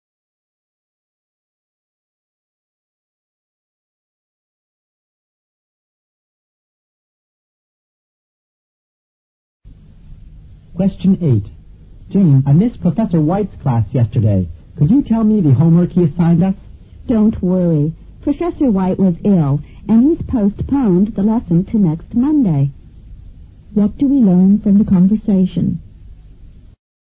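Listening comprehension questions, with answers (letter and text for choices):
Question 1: Q: What do we learn from the conversation?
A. The professor didn't give the lesson.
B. The student miss their professor very much.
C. A new course will begin next Monday.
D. Some homework was assigned to the students.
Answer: A. The professor didn't give the lesson.

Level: 六级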